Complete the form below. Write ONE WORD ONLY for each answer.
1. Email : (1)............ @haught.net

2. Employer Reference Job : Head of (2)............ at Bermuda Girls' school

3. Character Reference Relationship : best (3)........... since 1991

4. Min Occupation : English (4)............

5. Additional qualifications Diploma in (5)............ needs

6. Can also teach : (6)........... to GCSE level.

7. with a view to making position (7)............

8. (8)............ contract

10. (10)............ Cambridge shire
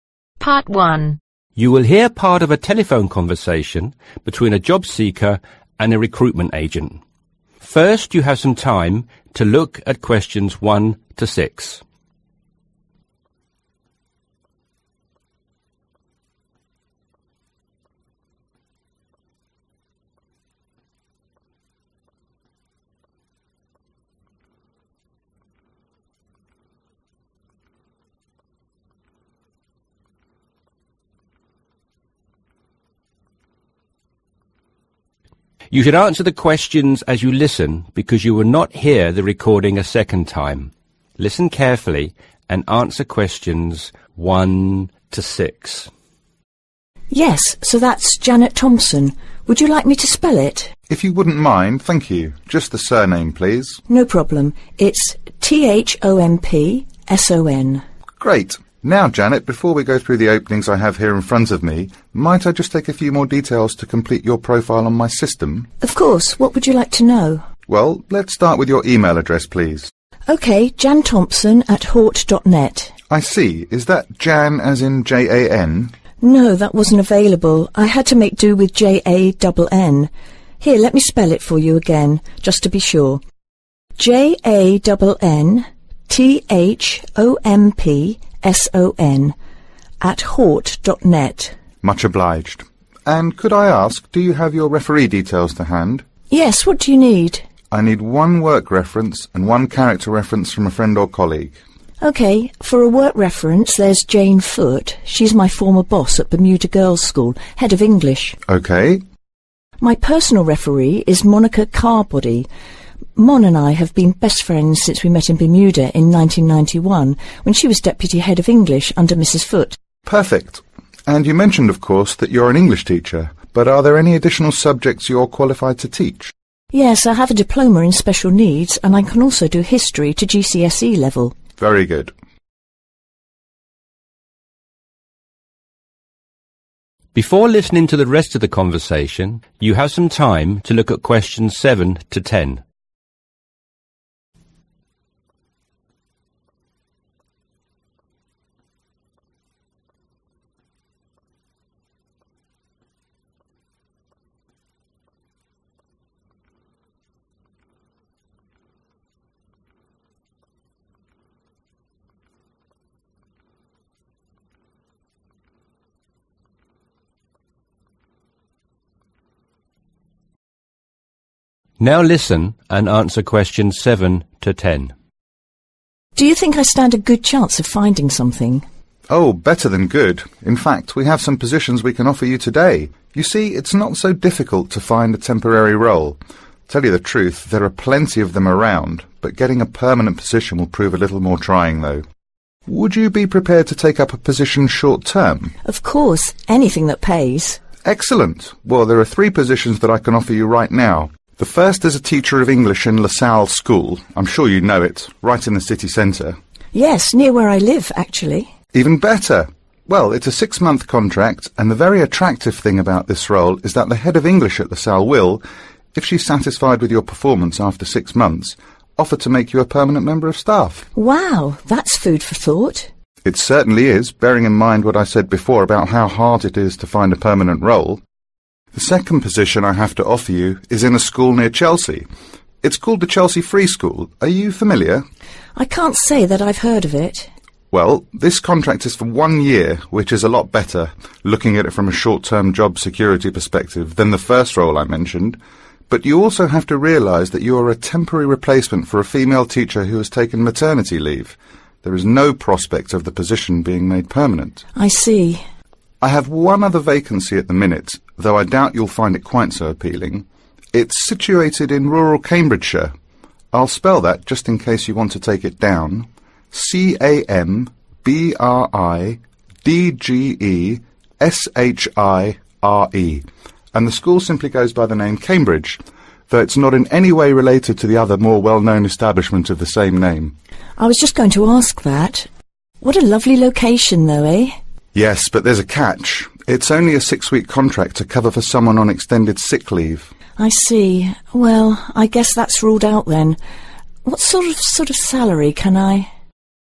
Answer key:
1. Jannthompson
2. English
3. Friend(s)
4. Teacher
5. Special
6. History
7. Permanent
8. One Year
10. Rural